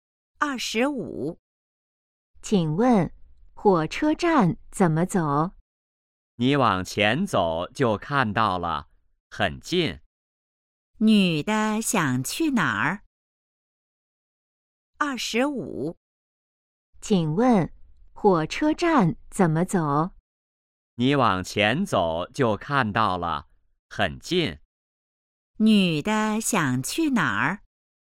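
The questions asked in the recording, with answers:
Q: 女的想去哪儿?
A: 火车站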